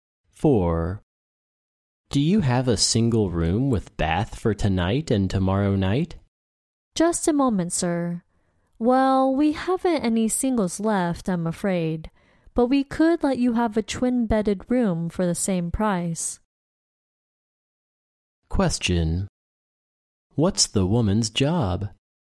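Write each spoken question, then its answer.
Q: What's the woman's job?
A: Hotel receptionist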